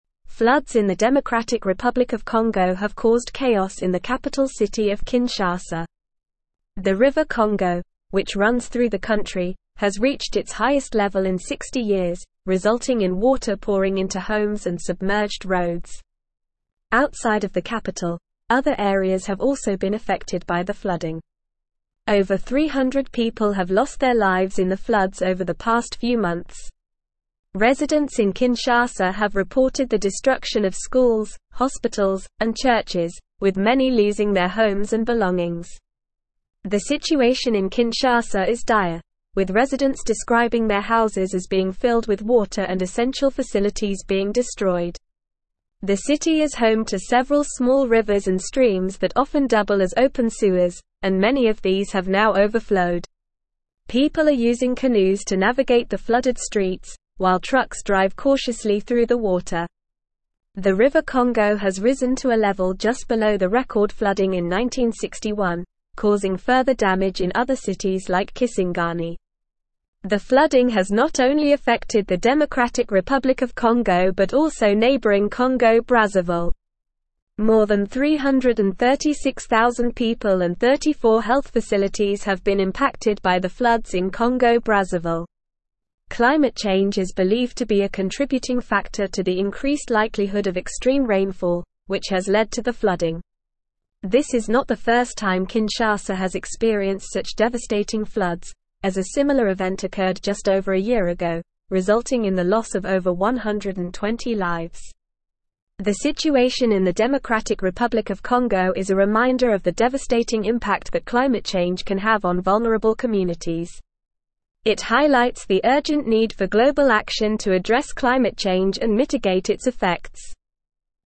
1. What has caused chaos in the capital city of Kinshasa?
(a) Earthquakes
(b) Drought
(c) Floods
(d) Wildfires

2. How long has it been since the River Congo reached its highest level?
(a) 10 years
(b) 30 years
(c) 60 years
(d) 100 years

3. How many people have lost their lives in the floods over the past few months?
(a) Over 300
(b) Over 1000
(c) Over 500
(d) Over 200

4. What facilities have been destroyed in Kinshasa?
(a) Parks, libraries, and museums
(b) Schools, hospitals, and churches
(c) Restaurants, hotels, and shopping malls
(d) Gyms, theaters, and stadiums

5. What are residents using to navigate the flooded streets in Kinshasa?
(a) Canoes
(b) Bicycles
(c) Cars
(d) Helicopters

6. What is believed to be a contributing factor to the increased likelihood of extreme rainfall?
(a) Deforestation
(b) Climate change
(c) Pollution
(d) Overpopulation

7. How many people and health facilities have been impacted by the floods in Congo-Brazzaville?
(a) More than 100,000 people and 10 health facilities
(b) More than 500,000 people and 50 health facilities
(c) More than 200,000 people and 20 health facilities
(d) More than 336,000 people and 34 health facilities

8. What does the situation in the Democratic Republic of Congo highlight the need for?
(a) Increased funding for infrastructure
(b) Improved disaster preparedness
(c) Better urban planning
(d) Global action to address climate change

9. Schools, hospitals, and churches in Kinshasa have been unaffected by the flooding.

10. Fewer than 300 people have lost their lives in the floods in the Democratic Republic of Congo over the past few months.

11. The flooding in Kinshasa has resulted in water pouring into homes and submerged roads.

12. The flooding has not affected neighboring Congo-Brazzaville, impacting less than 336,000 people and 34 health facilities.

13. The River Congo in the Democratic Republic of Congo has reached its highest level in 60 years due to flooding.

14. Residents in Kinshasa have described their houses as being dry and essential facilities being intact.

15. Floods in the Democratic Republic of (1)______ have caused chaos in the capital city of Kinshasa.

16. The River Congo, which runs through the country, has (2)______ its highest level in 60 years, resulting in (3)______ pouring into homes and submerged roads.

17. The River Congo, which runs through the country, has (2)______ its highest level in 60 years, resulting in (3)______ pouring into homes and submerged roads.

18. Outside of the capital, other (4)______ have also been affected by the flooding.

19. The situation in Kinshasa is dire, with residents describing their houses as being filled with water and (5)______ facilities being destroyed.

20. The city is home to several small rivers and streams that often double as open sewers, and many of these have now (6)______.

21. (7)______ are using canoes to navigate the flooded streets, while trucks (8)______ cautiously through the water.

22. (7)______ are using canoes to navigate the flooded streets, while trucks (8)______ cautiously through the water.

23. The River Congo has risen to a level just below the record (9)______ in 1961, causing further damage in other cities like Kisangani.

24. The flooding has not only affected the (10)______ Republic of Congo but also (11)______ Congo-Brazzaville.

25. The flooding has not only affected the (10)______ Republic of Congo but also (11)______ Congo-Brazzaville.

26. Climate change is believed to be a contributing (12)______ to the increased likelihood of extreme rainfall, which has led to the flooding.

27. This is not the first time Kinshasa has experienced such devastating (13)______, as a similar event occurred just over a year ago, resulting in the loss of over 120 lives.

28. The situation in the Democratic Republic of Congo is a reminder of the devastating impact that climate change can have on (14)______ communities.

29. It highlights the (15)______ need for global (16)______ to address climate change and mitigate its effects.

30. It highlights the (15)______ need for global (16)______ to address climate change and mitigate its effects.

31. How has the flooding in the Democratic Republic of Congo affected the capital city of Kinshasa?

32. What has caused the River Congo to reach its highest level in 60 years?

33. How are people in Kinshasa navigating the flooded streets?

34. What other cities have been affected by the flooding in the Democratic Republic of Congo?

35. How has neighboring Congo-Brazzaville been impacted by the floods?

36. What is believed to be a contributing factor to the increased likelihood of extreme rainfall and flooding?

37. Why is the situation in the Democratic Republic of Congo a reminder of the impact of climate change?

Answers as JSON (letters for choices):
{"1": "c", "2": "c", "3": "a", "4": "b", "5": "a", "6": "b", "7": "d", "8": "d", "9": "False", "10": "False", "11": "True", "12": "False", "13": "True", "14": "False", "15": "Congo", "16": "reached", "17": "water", "18": "areas", "19": "essential", "20": "overflowed", "21": "People", "22": "drive", "23": "flooding", "24": "Democratic", "25": "neighboring", "26": "factor", "27": "floods", "28": "vulnerable", "29": "urgent", "30": "action", "31": "The flooding in the Democratic Republic of Congo has caused chaos in the capital city of Kinshasa, with water pouring into homes and submerged roads.", "32": "The River Congo has reached its highest level in 60 years due to extreme rainfall, which is believed to be a result of climate change.", "33": "People in Kinshasa are using canoes to navigate the flooded streets, while trucks drive cautiously through the water.", "34": "Other cities, such as Kisangani, have also been affected by the flooding in the Democratic Republic of Congo.", "35": "In Congo-Brazzaville, more than 336,000 people and 34 health facilities have been impacted by the floods.", "36": "Climate change is believed to be a contributing factor to the increased likelihood of extreme rainfall and flooding.", "37": "The situation in the Democratic Republic of Congo is a reminder of the impact of climate change because it highlights the devastating effects it can have on vulnerable communities and the urgent need for global action to address it."}

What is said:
Floods in the Democratic Republic of Congo have caused chaos in the capital city of Kinshasa. The River Congo, which runs through the country, has reached its highest level in 60 years, resulting in water pouring into homes and submerged roads. Outside of the capital, other areas have also been affected by the flooding. Over 300 people have lost their lives in the floods over the past few months. Residents in Kinshasa have reported the destruction of schools, hospitals, and churches, with many losing their homes and belongings.
The situation in Kinshasa is dire, with residents describing their houses as being filled with water and essential facilities being destroyed. The city is home to several small rivers and streams that often double as open sewers, and many of these have now overflowed. People are using canoes to navigate the flooded streets, while trucks drive cautiously through the water. The River Congo has risen to a level just below the record flooding in 1961, causing further damage in other cities like Kisangani.
The flooding has not only affected the Democratic Republic of Congo but also neighboring Congo-Brazzaville. More than 336,000 people and 34 health facilities have been impacted by the floods in Congo-Brazzaville. Climate change is believed to be a contributing factor to the increased likelihood of extreme rainfall, which has led to the flooding. This is not the first time Kinshasa has experienced such devastating floods, as a similar event occurred just over a year ago, resulting in the loss of over 120 lives.
The situation in the Democratic Republic of Congo is a reminder of the devastating impact that climate change can have on vulnerable communities. It highlights the urgent need for global action to address climate change and mitigate its effects.

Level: Level 4